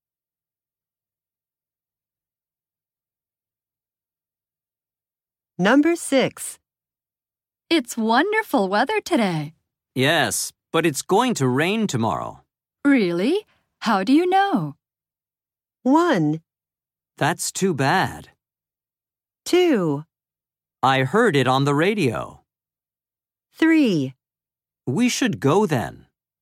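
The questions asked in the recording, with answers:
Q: Really? How do you know?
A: 2: I heard it on the radio.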